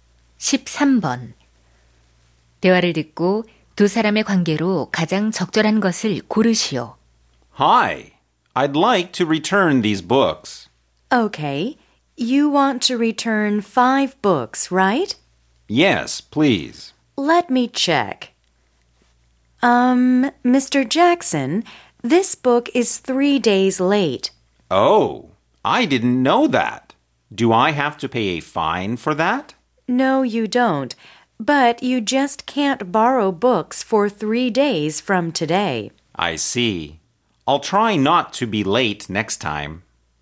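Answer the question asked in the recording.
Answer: 도서관 사서 - 이용자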